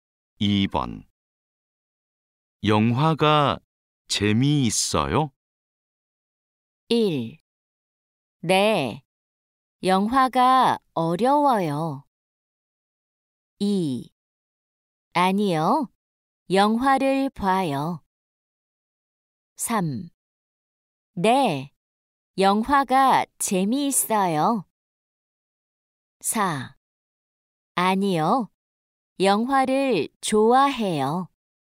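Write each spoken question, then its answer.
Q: 영화가 재미있어요?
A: 3: 네, 영화가 재미있어요.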